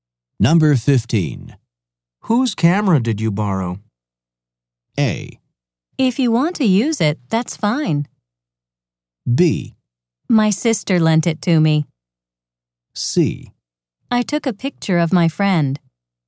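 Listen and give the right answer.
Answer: B: My sister lent it to me.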